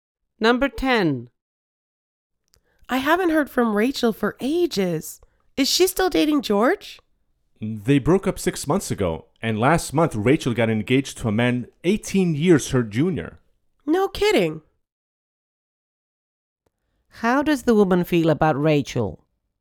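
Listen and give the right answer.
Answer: She is surprised.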